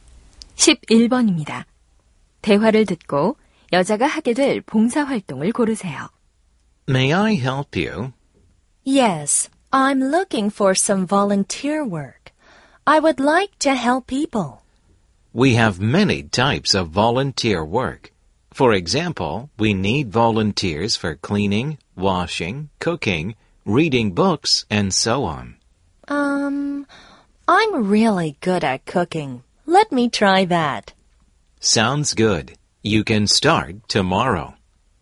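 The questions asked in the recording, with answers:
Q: 대화를 듣고 여자가 하게 될 봉사 활동을 고르세요.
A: 요리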